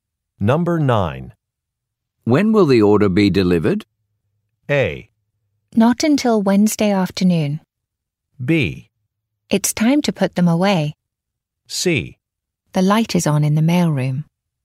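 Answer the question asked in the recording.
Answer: A: Not until Wednesday afternoon.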